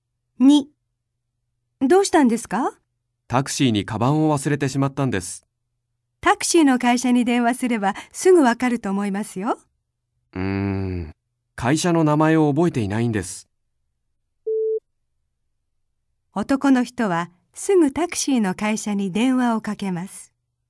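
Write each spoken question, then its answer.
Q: 男の人はすぐタクシーの会社に電話をかけます。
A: ×(正しくない)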